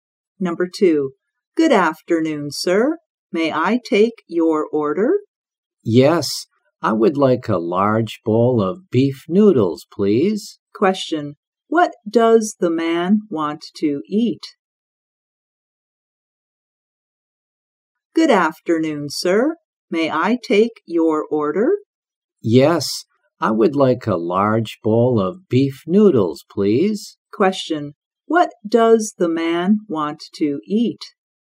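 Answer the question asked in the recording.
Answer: A large bowl of beef noodles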